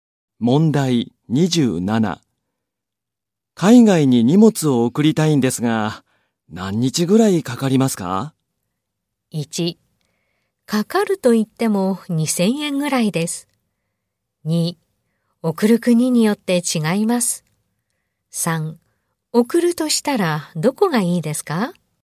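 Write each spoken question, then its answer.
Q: 海外に荷物を送りたいんですが、何日ぐらいかかりますか?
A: 2: 送る国によって違います。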